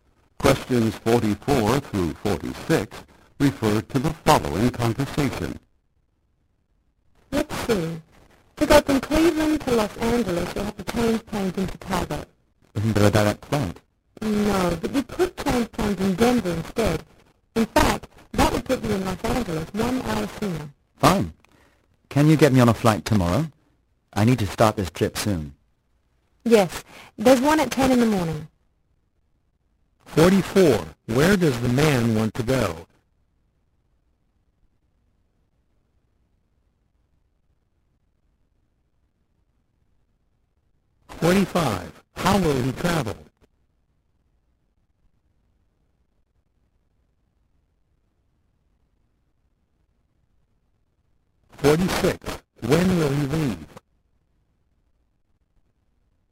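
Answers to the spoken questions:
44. Los Angeles
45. By plane, changing in Denver
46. Tomorrow at 10 in the morning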